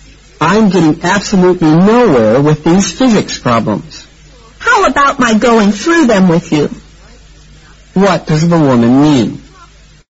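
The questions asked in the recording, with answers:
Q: What does the woman mean?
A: She offers to help him work through the physics problems.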